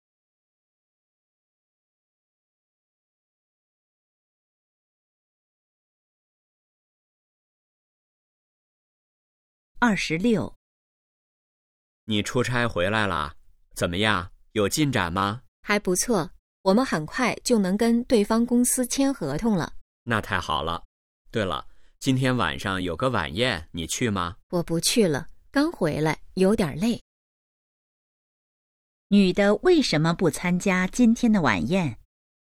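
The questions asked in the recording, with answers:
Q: 女的为什么不参加今天的晚宴?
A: 刚出差回来,有点累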